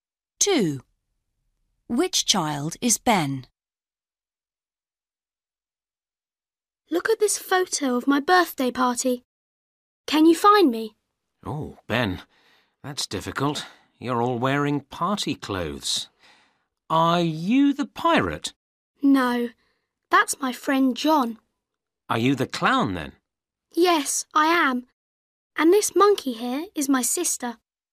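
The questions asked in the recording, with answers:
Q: Which child is Ben?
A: The clown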